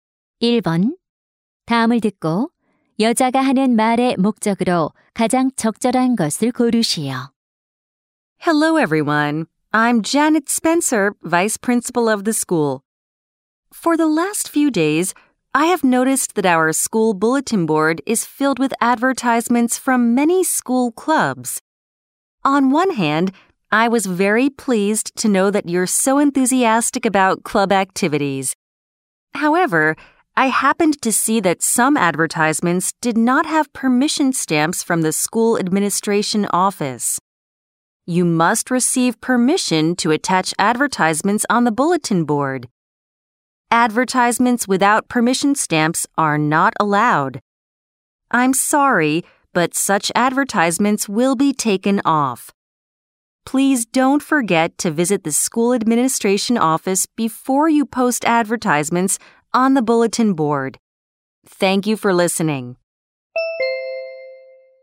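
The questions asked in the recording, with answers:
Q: 다음을 듣고 여자가 하는 말의 목적으로 가장 적절한 것을 고르시오.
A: 게시판에 광고를 붙이기 전에 학교 행정실의 허가 도장을 받도록 안내하려고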